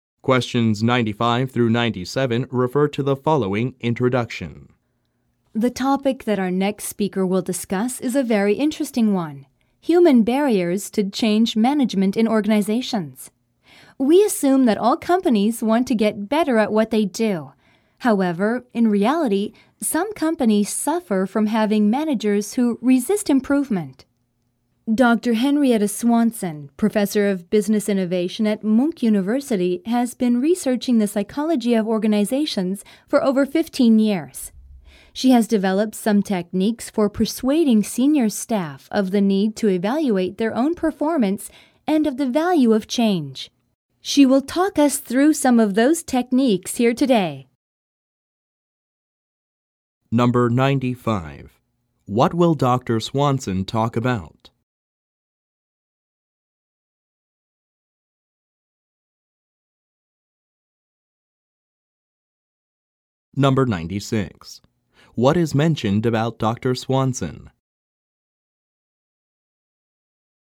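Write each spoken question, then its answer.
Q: What will Dr. Swanson talk about?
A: Human barriers to change management in organizations

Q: What kind of technique is mentioned?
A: Techniques for persuading senior staff to evaluate their own performance and of the value of change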